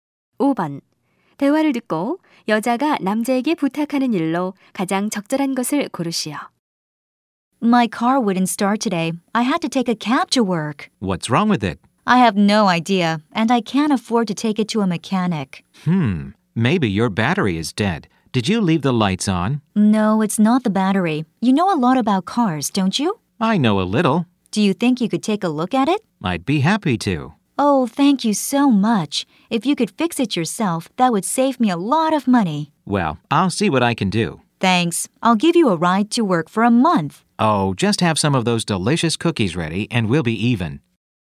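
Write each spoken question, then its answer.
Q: 대화를 듣고 여자가 남자에게 부탁하는 일로 가장 적절한 것을 고르시오.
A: 고장 난 차를 봐 주기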